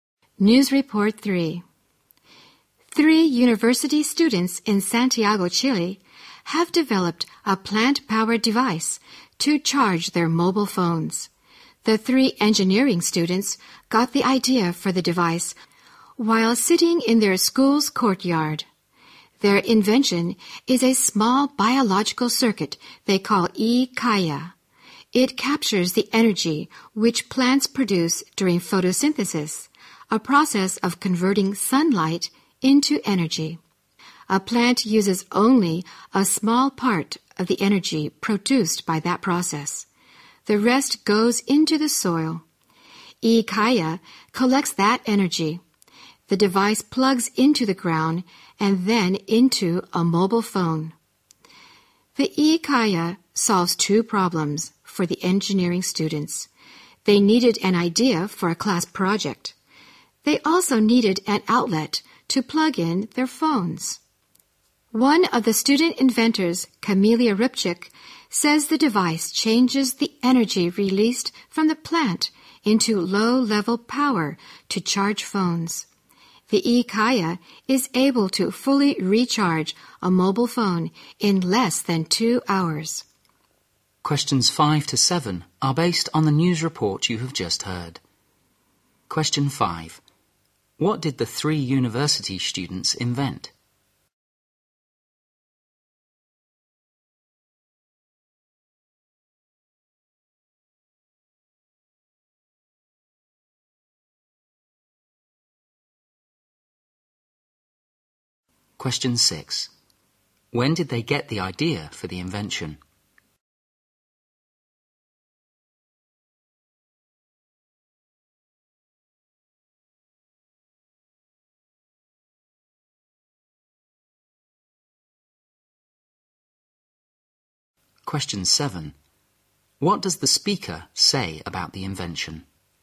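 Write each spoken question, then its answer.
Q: What did the three university students invent?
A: A plant-powered device to charge mobile phones

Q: When did they get the idea for the invention?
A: While sitting in their school's courtyard

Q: What does the speaker say about the invention?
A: It can fully recharge a mobile phone in less than 2 hours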